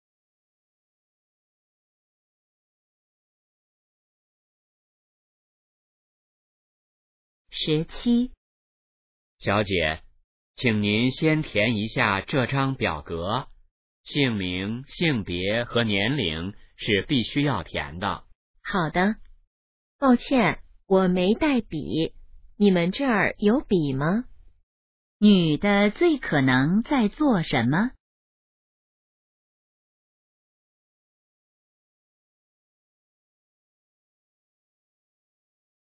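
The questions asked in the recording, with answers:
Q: 女的最可能在做什么?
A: 填表格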